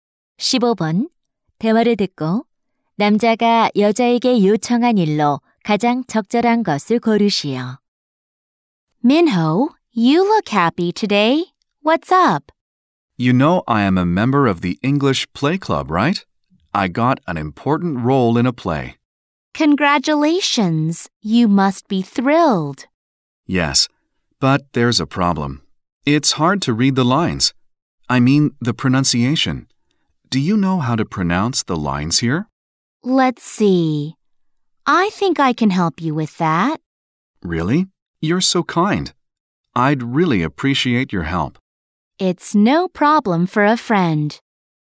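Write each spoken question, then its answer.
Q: 대화를 듣고 남자가 여자에게 요청한 일로 가장 적절한 것을 고르시오.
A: 연극 대사 발음 도와주기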